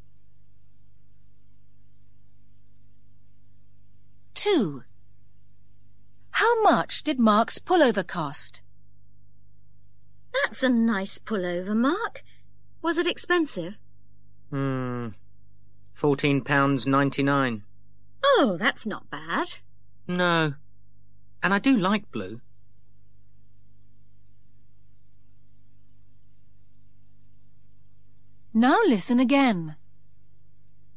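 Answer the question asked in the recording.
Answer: £14.99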